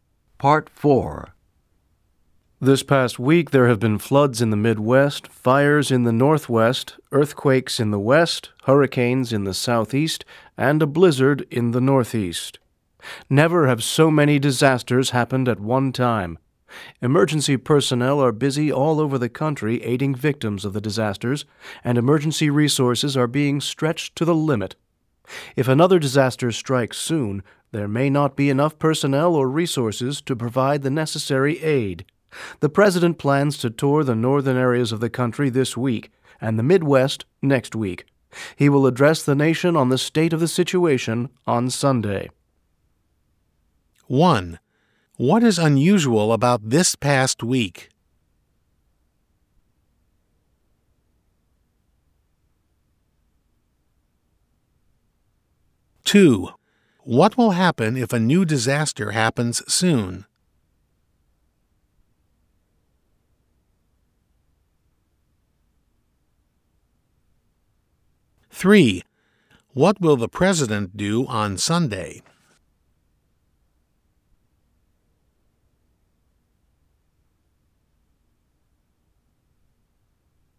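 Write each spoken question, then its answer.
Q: What is unusual about this past week?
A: So many disasters happened at one time.

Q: What will happen if a new disaster happens soon?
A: There may not be enough personnel or resources to provide aid.

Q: What will the president do on Sunday?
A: Address the nation on the situation.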